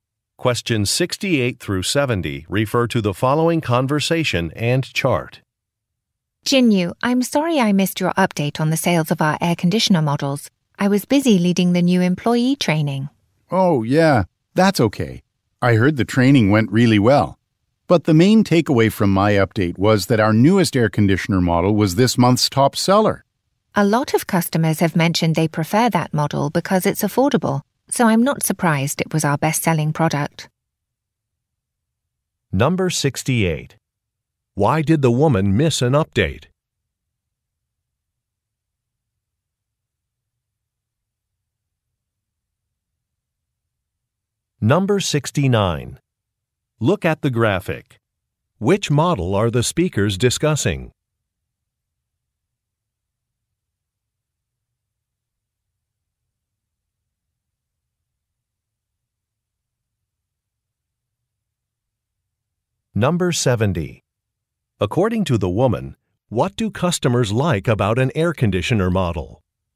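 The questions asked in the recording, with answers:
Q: Why did the woman miss an update?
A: She was leading new employee training

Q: According to the woman, what do customers like about an air conditioner model?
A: It's affordable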